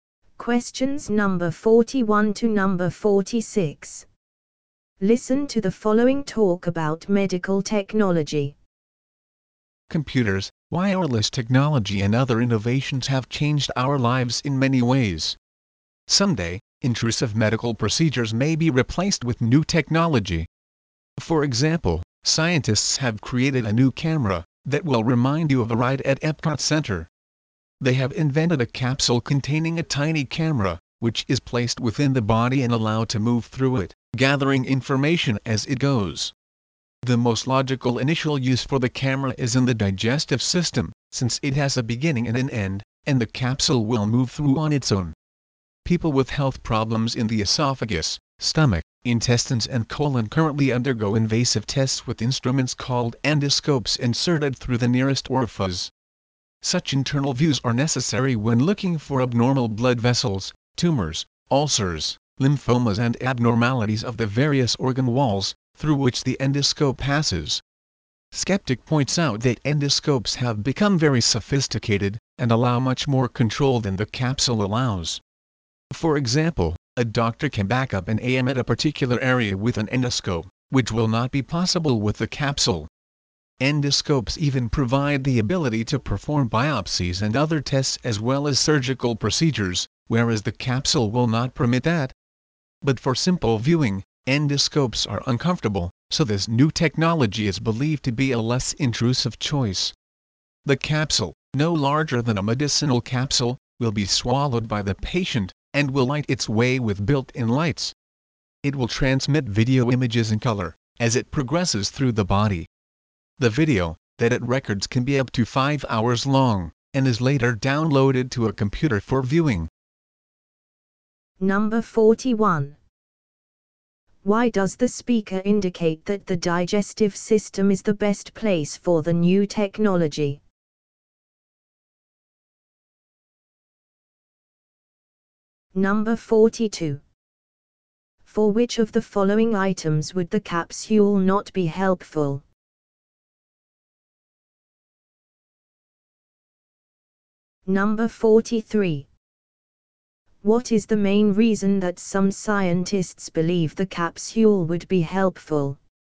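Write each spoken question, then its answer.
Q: Why does the speaker indicate that the digestive system is the best place for the new technology?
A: It has a beginning and an end, so the capsule moves through on its own.

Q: What is the main reason that some scientists believe the capsule would be helpful?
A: It is less intrusive and less uncomfortable than endoscopes.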